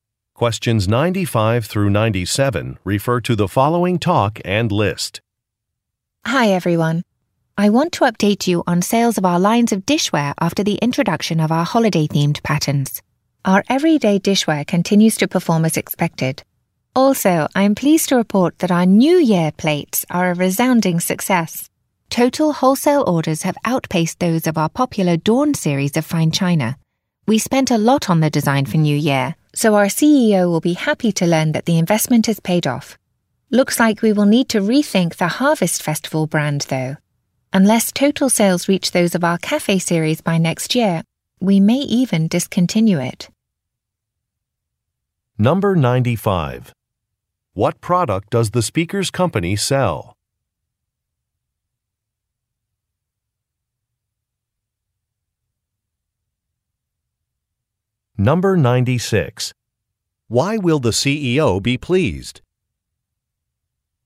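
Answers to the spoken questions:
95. Dishware
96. The investment in the New Year design paid off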